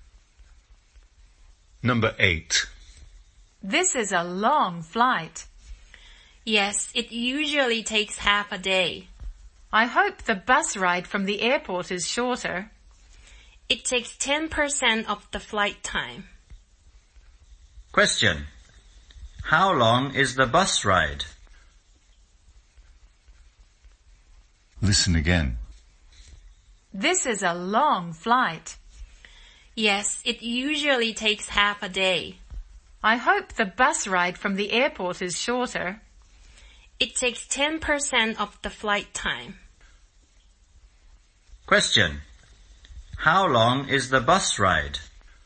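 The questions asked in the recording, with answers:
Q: How long is the bus ride?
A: About 1.2 hours (72 minutes)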